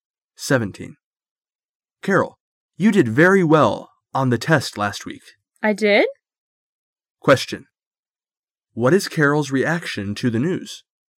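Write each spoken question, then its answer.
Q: What is Carol's reaction to the news?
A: She is surprised.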